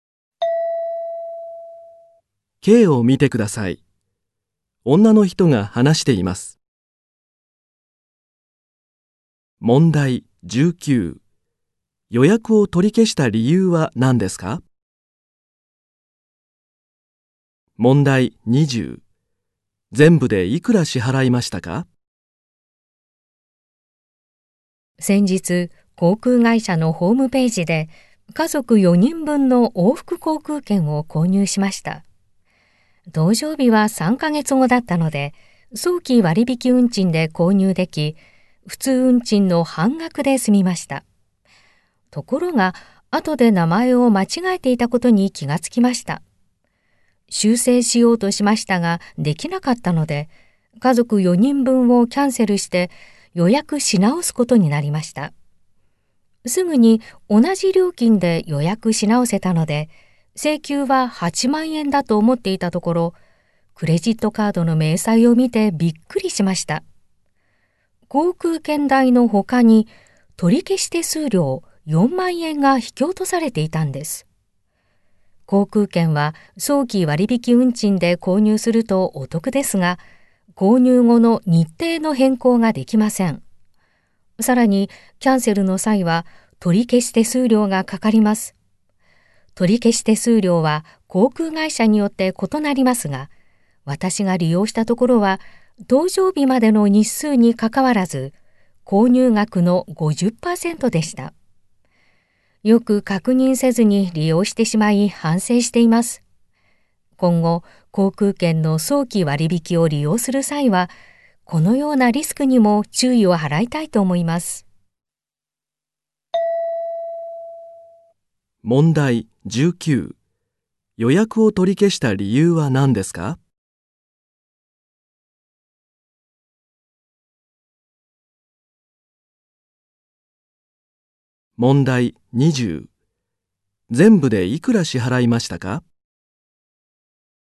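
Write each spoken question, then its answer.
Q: 予約を取り消した理由は何ですか?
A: 名前を間違えていたから

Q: 全部でいくら支払いましたか?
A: 12万円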